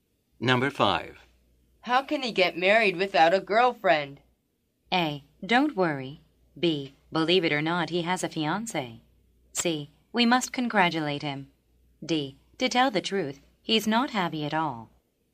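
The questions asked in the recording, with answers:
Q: How can he get married without a girlfriend?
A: B: Believe it or not, he has a fiancé.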